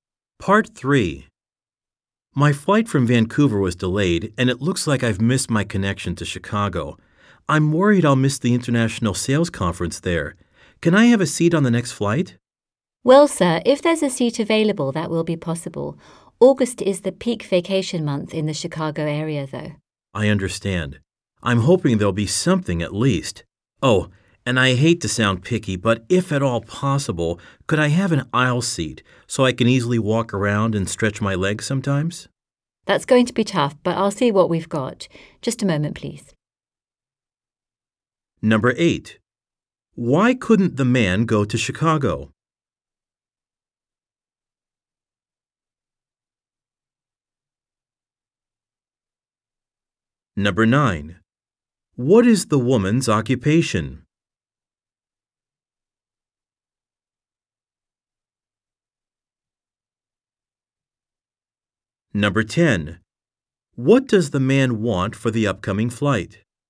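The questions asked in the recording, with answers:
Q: Why couldn't the man go to Chicago?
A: His flight from Vancouver was delayed and he missed his connection.

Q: What does the man want for the upcoming flight?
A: An aisle seat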